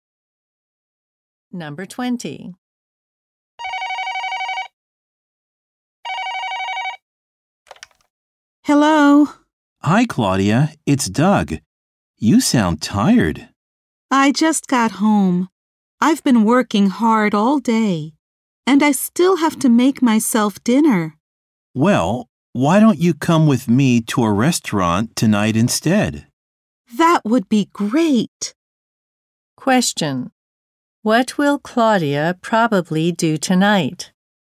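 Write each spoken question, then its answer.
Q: What will Claudia probably do tonight?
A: Go to a restaurant with Doug.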